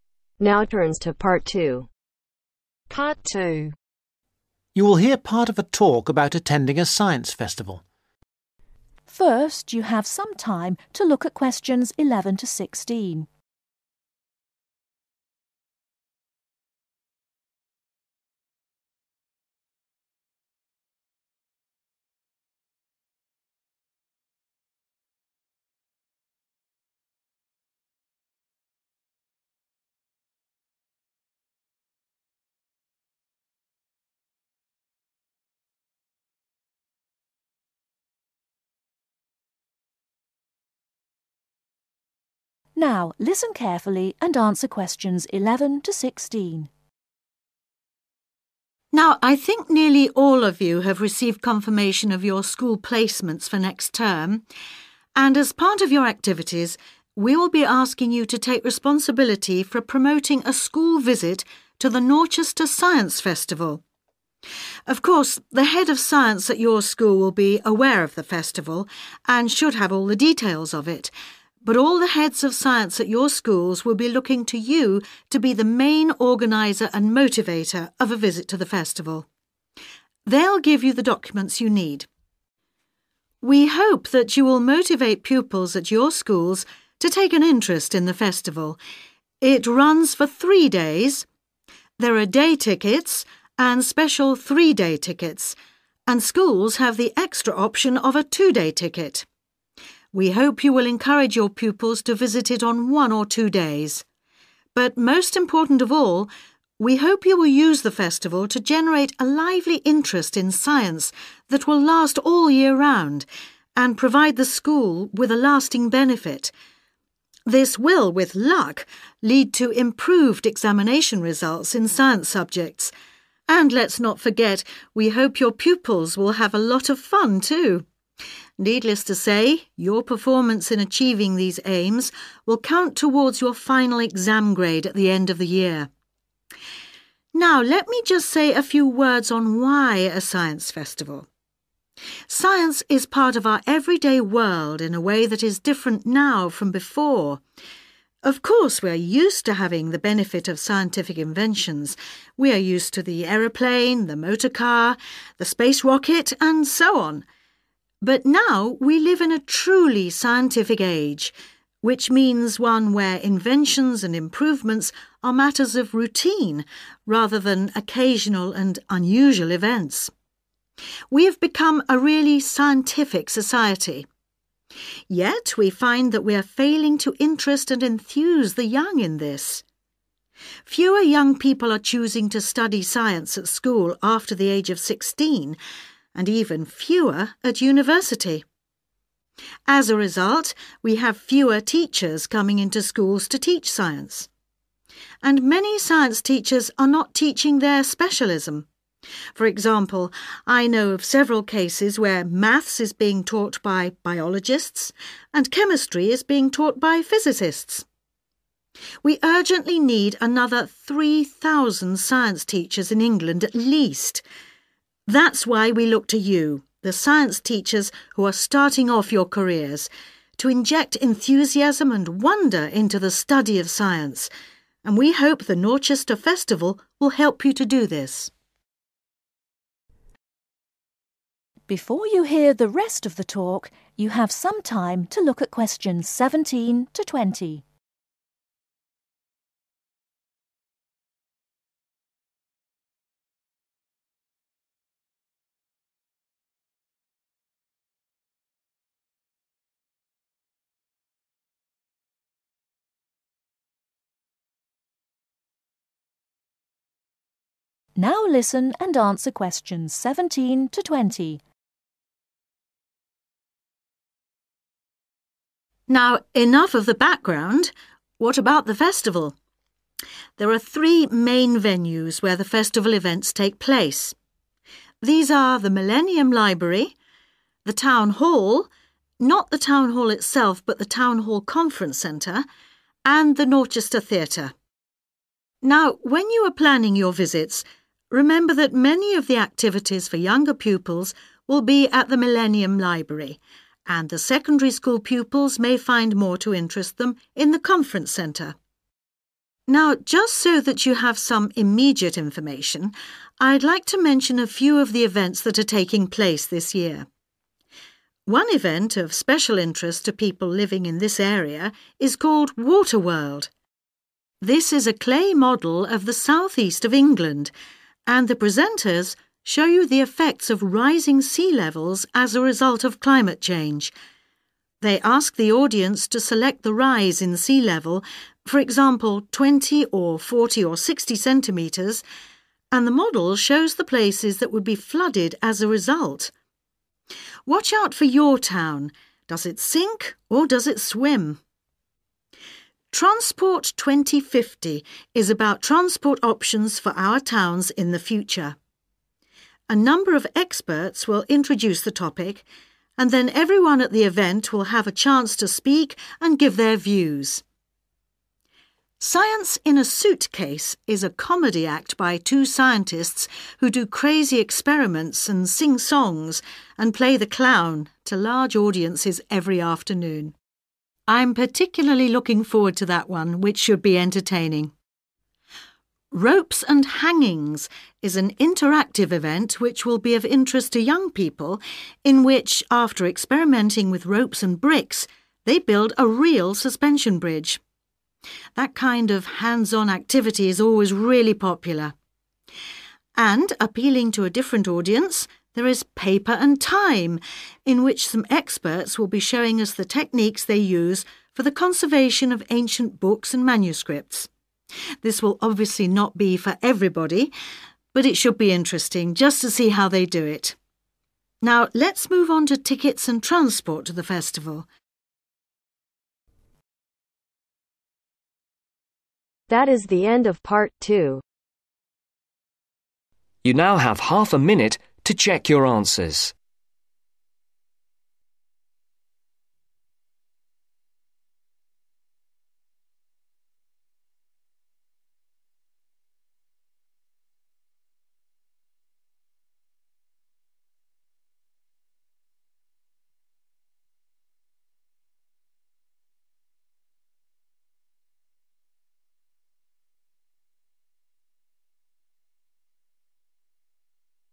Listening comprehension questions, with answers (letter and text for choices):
Choose the correct letter A , B or C.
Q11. What will the head of science probably do ?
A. arrange the visit to the festival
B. confirm the school placements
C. provide information the festival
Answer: C. provide information the festival

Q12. The student teachers should arrange visits that last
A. one or two days.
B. two or three days.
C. all three days.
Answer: A. one or two days.

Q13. The most important purpose of festival visits is to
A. get better exam grades.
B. create enthusiasm for science.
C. enable students to have fun.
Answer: B. create enthusiasm for science.

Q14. the central features of our scientific age are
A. inventions and improvements.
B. interesting and unusual events.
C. interest and enthusiasm for science.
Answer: A. inventions and improvements.

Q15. What kind of specialists are teaching maths ?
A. physicists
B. biologists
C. chemists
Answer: B. biologists

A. a show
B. an event of local interest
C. a technical demonstration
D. an open discussion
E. an interactive event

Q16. Water world ............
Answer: B. an event of local interest

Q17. Transport 2050 ............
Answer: D. an open discussion

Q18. Science in a suitcase ............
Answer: A. a show

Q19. Ropes and hangings ............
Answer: E. an interactive event

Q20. Paper and time .............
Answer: C. a technical demonstration